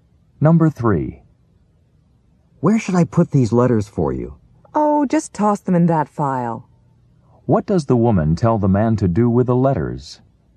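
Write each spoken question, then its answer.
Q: What does the woman tell the man to do with the letters?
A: Toss them in the file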